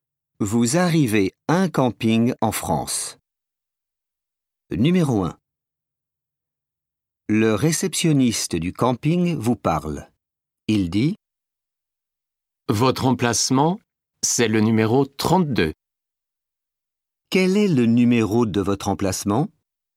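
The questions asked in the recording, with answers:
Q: Quel est le numéro de votre emplacement?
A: 32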